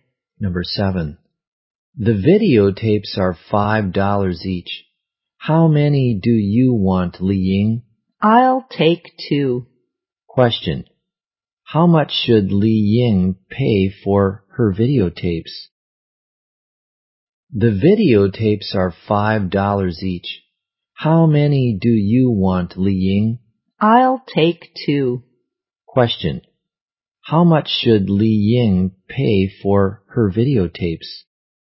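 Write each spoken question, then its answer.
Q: How much should Li Ying pay for her videotapes?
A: $10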